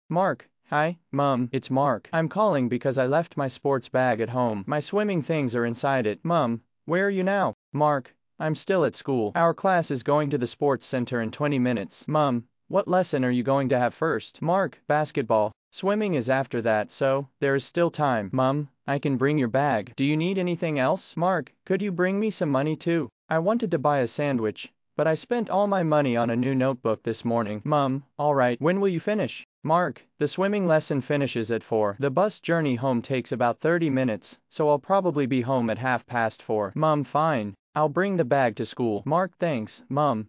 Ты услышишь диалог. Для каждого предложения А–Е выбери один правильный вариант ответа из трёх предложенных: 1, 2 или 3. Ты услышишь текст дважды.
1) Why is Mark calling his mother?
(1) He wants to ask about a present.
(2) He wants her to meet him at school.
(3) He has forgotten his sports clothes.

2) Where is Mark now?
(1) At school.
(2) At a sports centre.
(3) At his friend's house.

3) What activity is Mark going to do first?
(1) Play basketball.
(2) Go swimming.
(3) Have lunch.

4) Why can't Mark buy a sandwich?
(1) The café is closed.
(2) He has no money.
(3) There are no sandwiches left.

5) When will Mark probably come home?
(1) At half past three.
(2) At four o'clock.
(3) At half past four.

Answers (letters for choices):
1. 3
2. 1
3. 1
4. 2
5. 3

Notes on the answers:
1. Mark звонит, потому что забыл дома спортивную сумку с вещами для плавания.
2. В начале разговора Mark говорит, что он всё ещё находится в школе.
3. Сначала у него будет баскетбол, а плавание состоится после него.
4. Mark не может купить бутерброд, потому что утром потратил все деньги на тетрадь.
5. Урок заканчивается в четыре часа, а дорога занимает около тридцати минут. Поэтому Mark вернётся примерно в половине пятого.

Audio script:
It's Mark. I'm calling because I left my sports bag at home. My swimming things are inside it.
Mum: Where are you now?
Mark: I'm still at school. Our class is going to the sports centre in twenty minutes.
Mum: What lesson are you going to have first?
Mark: Basketball. Swimming is after that, so there is still time.
Mum: I can bring your bag. Do you need anything else?
Mark: Could you bring me some money too? I wanted to buy a sandwich, but I spent all my money on a new notebook this morning.
Mum: All right. When will you finish?
Mark: The swimming lesson finishes at four. The bus journey home takes about thirty minutes, so I'll probably be home at half past four.
Mum: Fine. I'll bring the bag to school.
Mark: Thanks, Mum!

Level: 4 классе